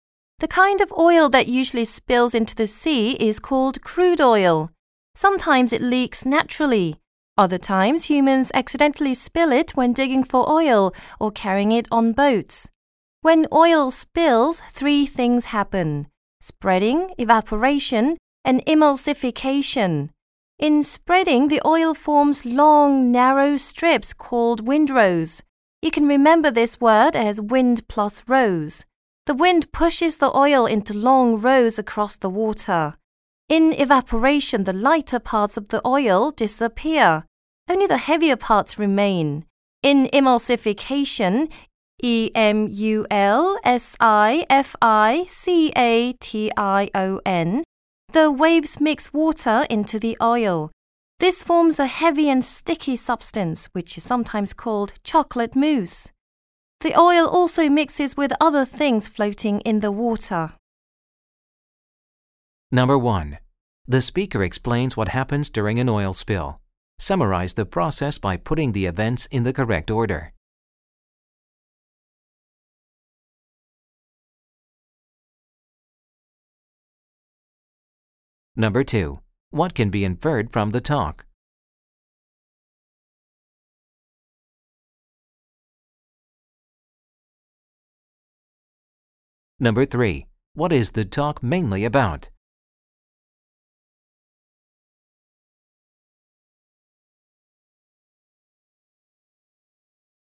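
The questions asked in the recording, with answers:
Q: What is the talk mainly about?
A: What happens when crude oil spills into the sea: spreading, evaporation and emulsification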